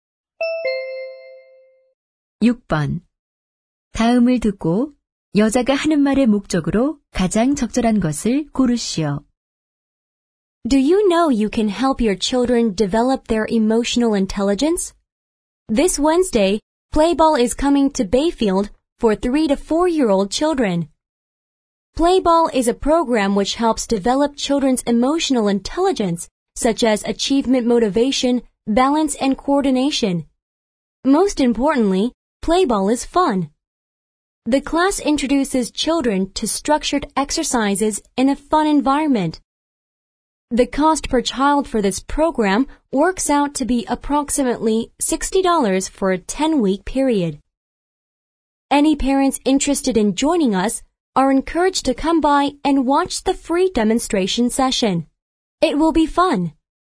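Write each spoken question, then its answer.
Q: 다음을 듣고 여자가 하는 말의 목적으로 가장 적절한 것을 고르시오.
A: 아동 정서 지능 프로그램(Playball) 홍보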